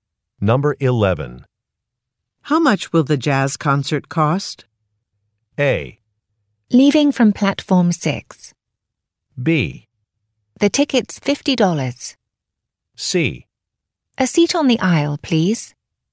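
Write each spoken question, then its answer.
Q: How much will the jazz concert cost?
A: B: The ticket's $50.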